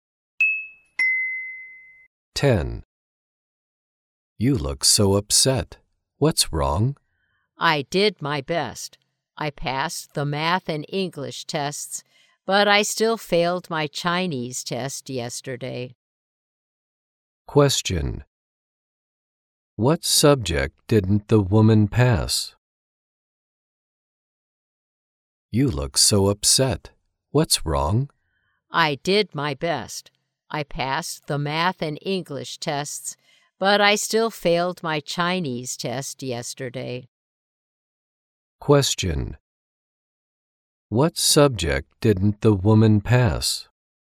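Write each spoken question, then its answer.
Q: What subject didn't the woman pass?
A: Chinese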